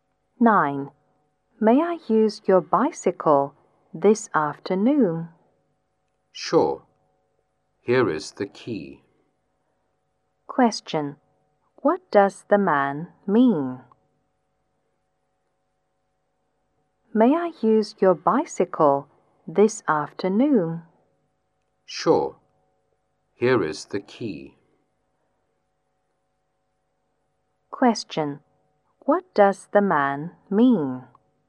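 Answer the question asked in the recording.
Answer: The woman can use his bicycle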